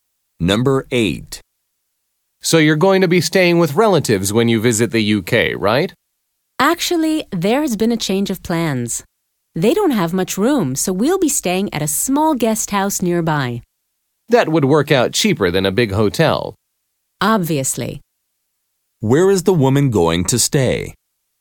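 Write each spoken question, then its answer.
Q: Where is the woman going to stay?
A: At a small guest house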